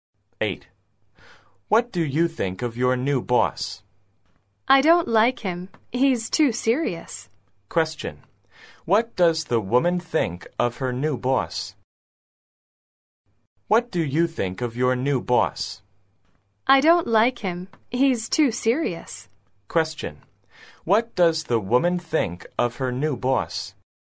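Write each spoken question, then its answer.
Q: What does the woman think of her new boss?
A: She doesn't like him; he's too serious.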